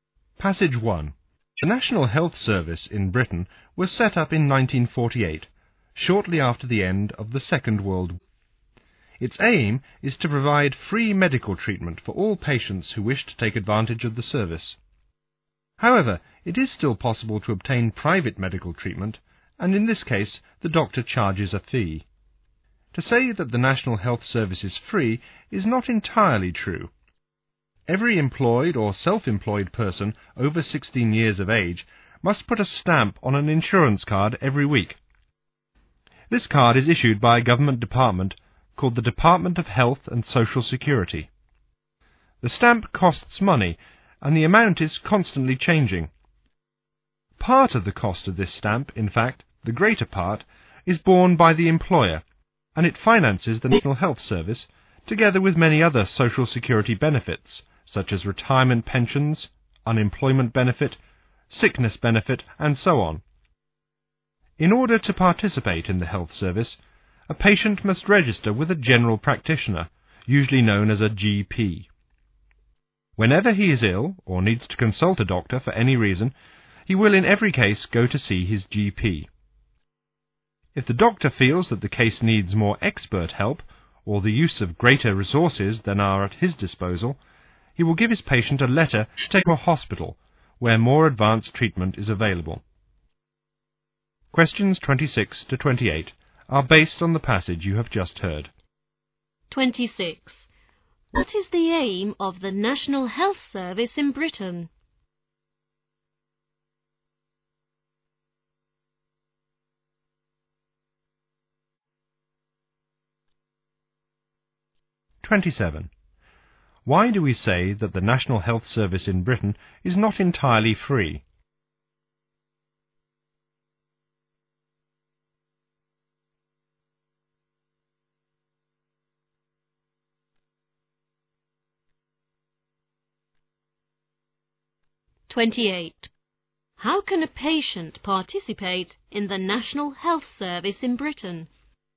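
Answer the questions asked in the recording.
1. To provide free medical treatment for all patients
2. Workers must buy a weekly insurance stamp
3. By registering with a general practitioner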